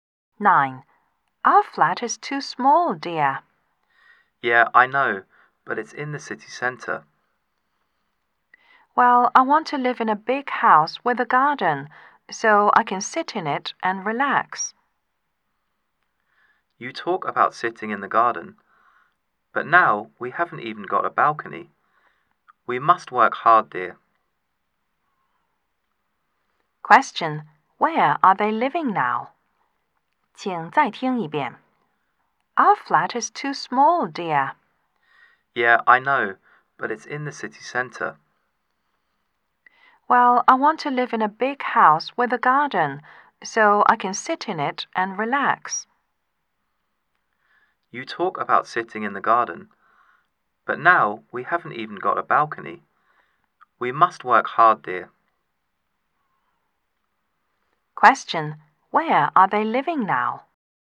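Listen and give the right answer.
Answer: In a small flat in the city center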